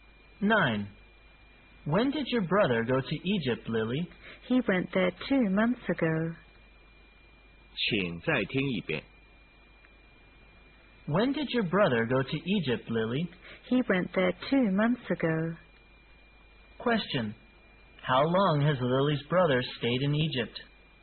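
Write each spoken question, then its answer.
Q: Question. How long has Lily's brother stayed in Egypt?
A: Two months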